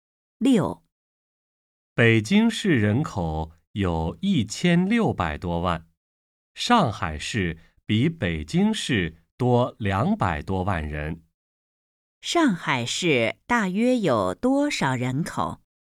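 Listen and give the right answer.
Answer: 1800多万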